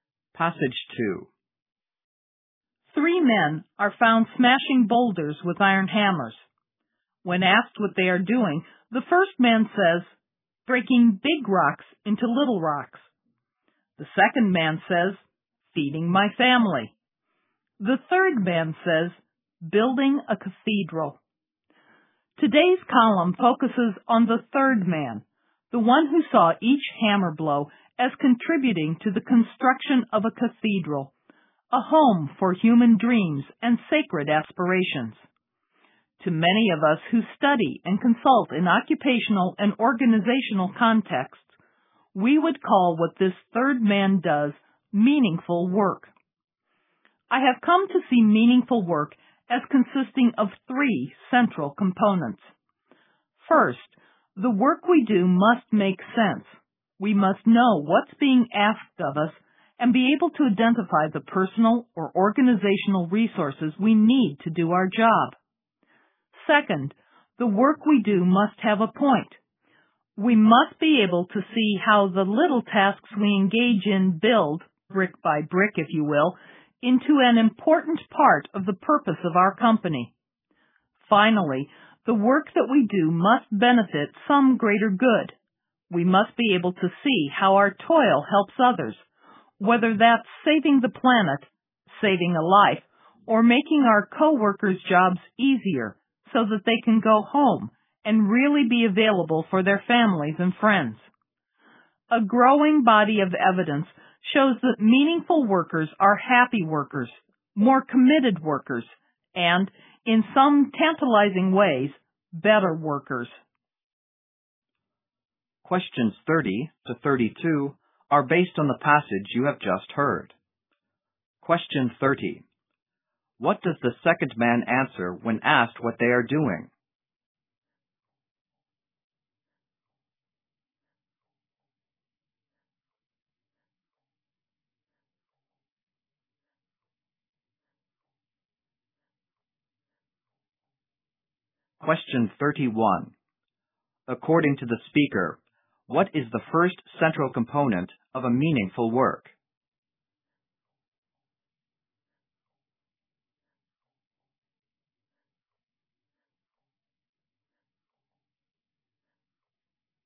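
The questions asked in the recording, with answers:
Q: What does the second man answer when asked what they are doing?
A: Feeding my family

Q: According to the speaker, what is the first central component of a meaningful work?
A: The work must make sense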